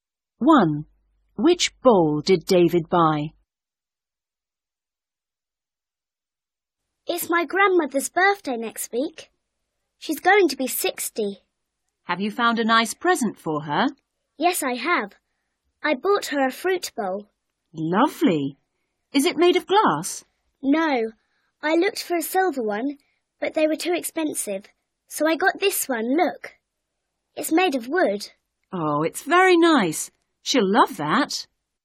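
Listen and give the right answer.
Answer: a wooden fruit bowl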